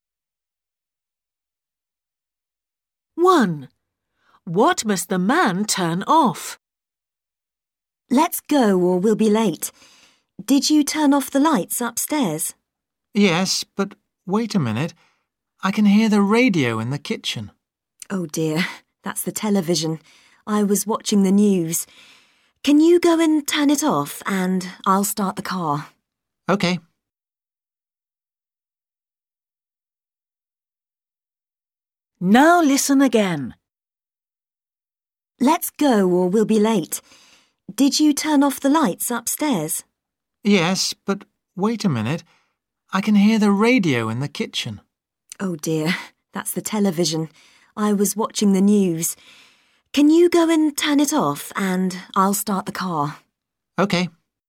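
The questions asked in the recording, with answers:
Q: What must the man turn off?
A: the television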